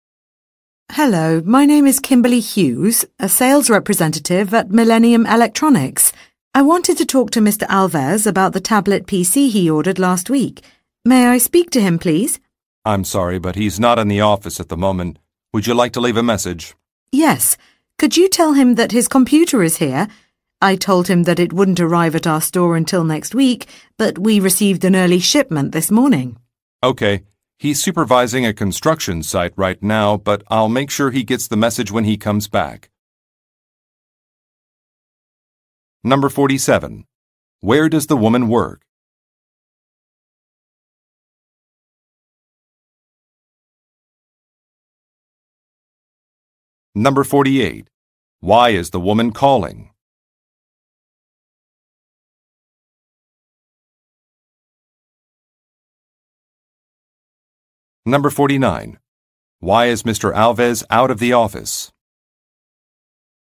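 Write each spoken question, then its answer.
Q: Where does the woman work?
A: At an electronics store (Millennium Electronics)

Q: Why is the woman calling?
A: To say the tablet PC he ordered has arrived early

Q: Why is Mr. Alves out of the office?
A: He is supervising a construction site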